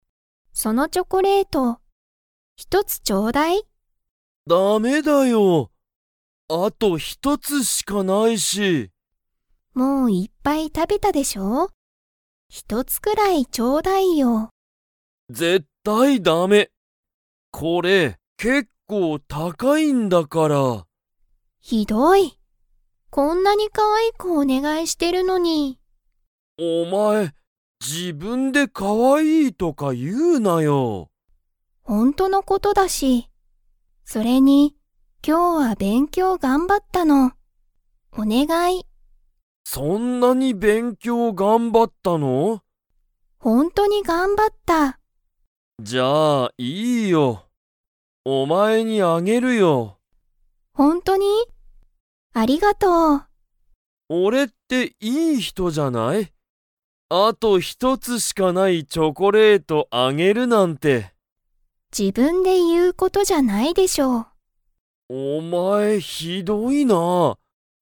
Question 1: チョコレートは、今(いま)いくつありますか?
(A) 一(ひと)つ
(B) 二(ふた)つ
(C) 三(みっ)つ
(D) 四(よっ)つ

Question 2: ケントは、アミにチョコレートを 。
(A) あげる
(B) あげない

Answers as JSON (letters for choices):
{"1": "A", "2": "A"}

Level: Level 3